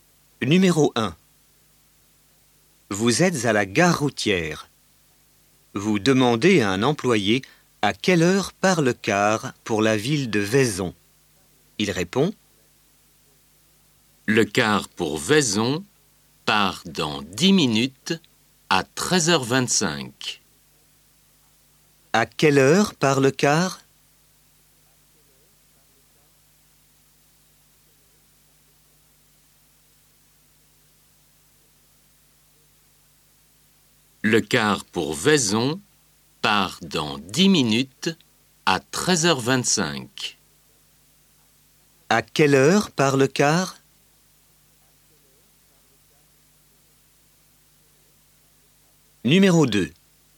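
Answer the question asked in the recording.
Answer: À 13h25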